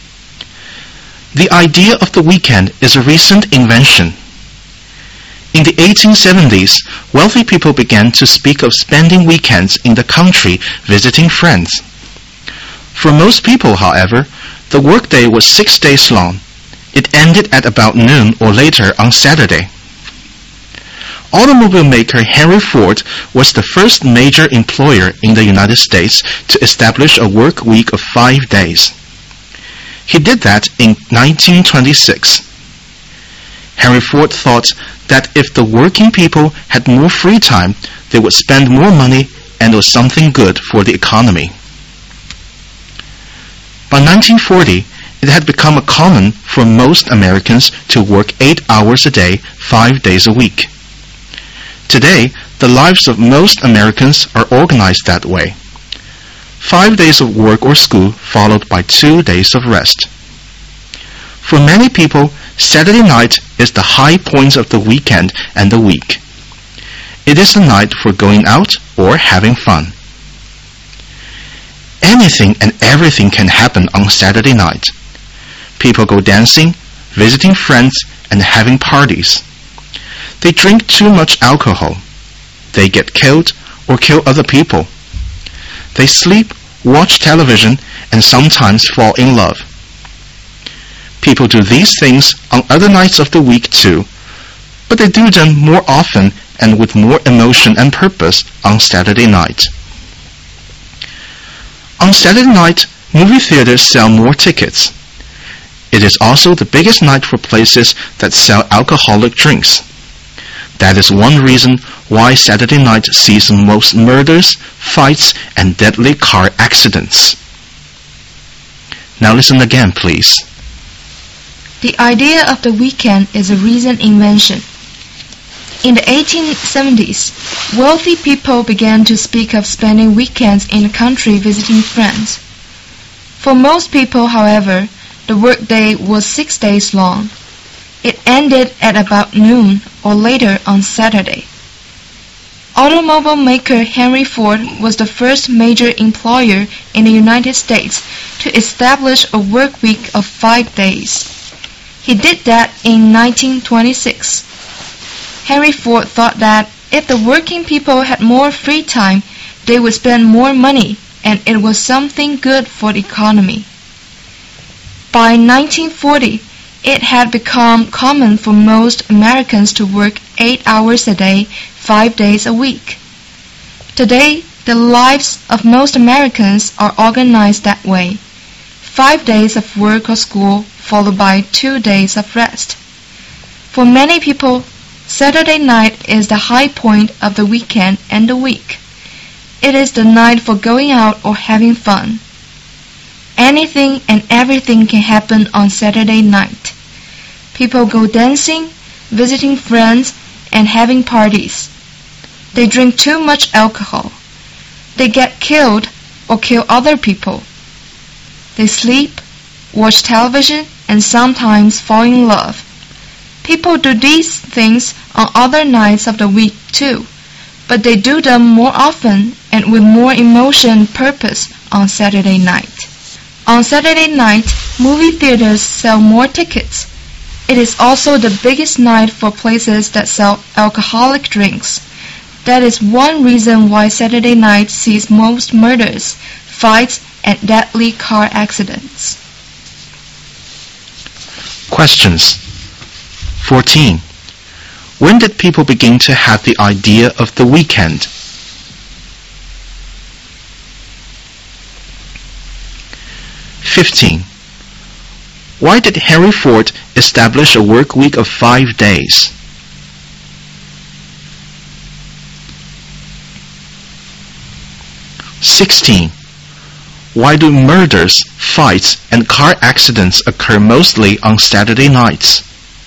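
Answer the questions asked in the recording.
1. In the 1870s
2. With more free time workers would spend more money, which was good for the economy
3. It is the biggest night for places selling alcoholic drinks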